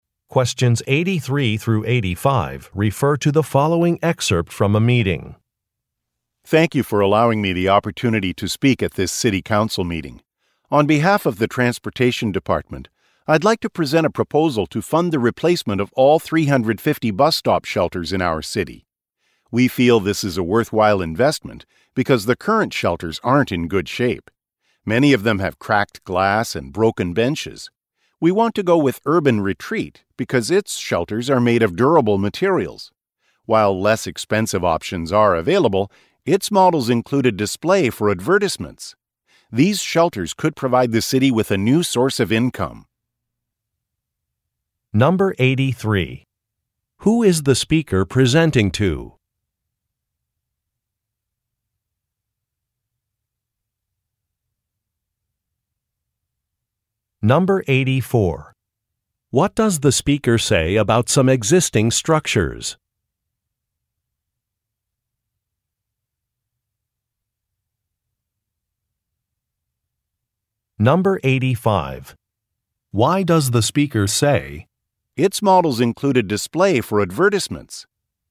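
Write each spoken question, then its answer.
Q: Who is the speaker presenting to?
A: The City Council

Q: What does the speaker say about some existing structures?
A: They are in poor condition, with cracked glass and broken benches

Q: Why does the speaker say,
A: To point out that the shelters could earn the city money from advertising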